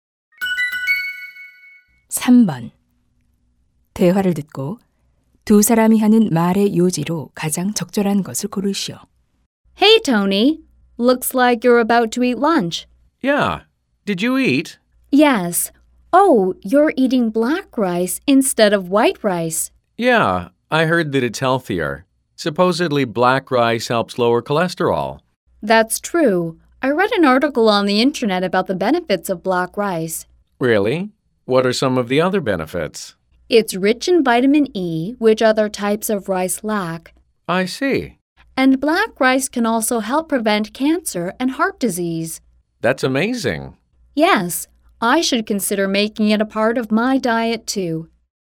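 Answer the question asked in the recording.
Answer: 흑미는 건강에 여러 이점이 있다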